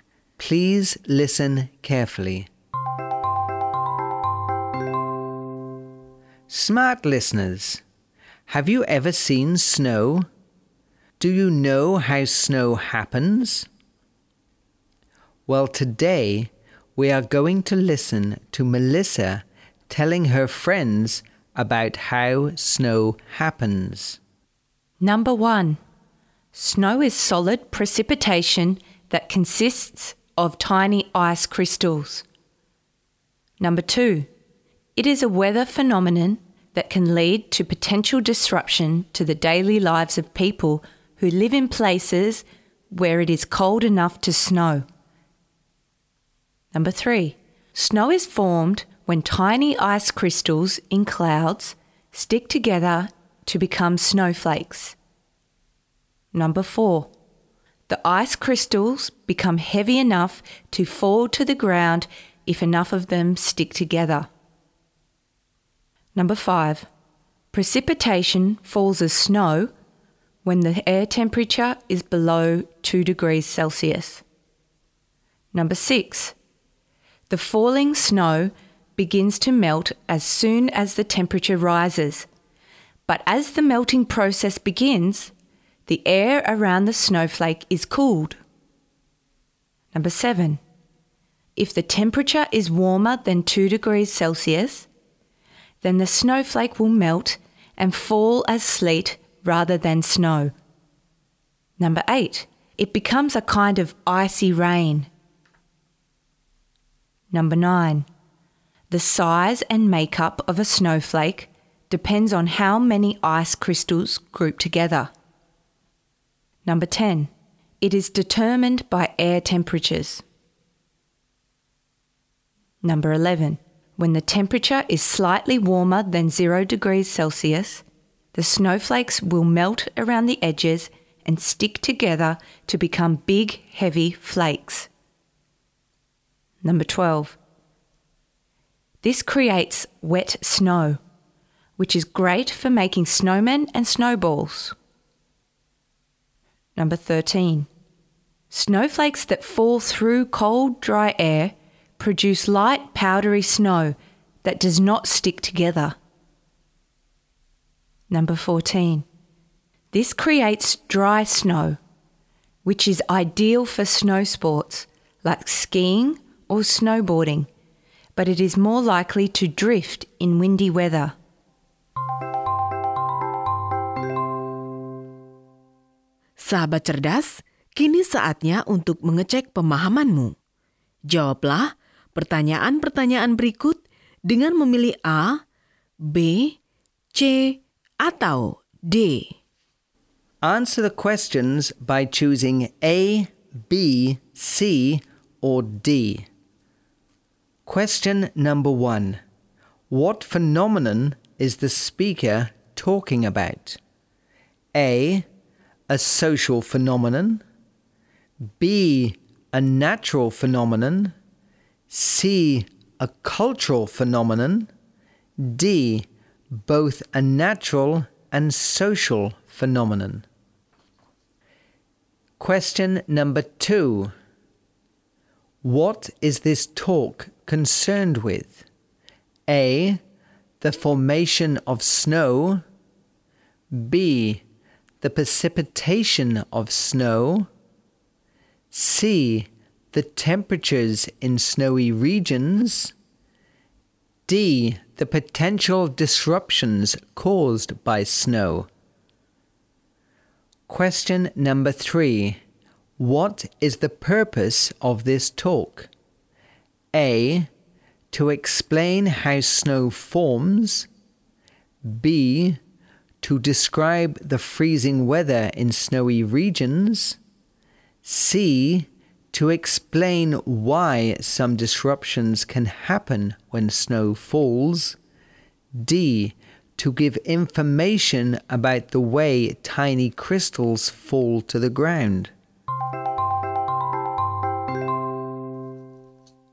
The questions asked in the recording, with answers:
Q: What phenomenon is the speaker talking about?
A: B. A natural phenomenon.

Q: What is this talk concerned with?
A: A. The formation of snow.

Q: What is the purpose of this talk?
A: A. To explain how snow forms.